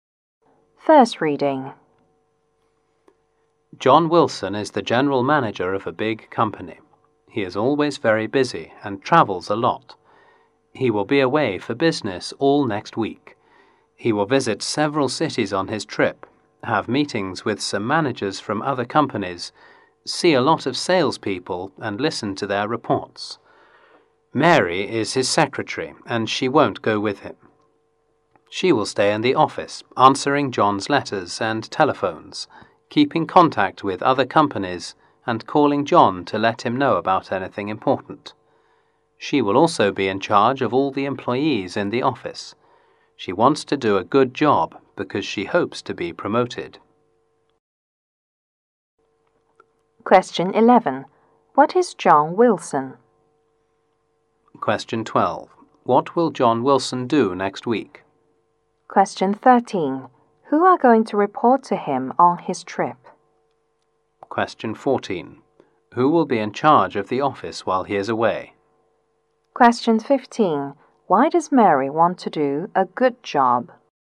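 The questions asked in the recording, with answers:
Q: What is John Wilson?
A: General manager

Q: What will John Wilson do next week?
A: Travel on business

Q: Who are going to report to him on his trip?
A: Salespeople

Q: Who will be in charge of the office while he is away?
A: Mary, his secretary

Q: Why does Mary want to do a good job?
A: To be promoted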